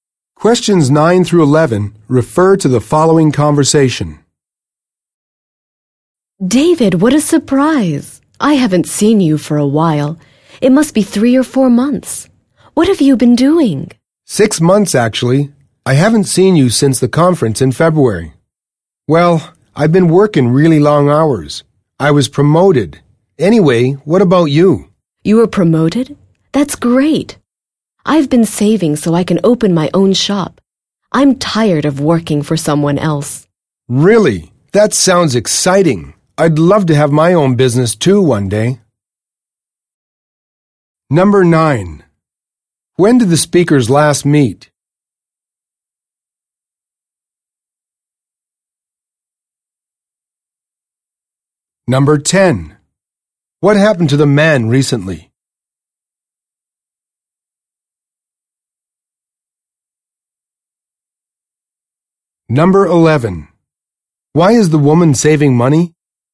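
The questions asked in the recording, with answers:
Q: When did the speakers last meet?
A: At the conference in February, six months ago

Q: What happened to the man recently?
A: He was promoted

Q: Why is the woman saving money?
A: To open her own shop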